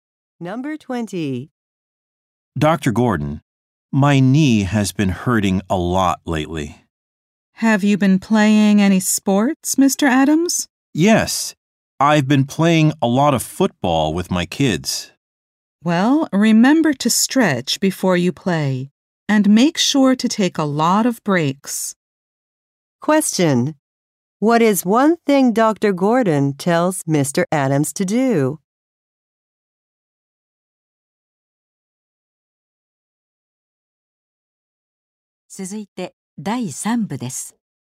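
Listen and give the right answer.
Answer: Stretch before playing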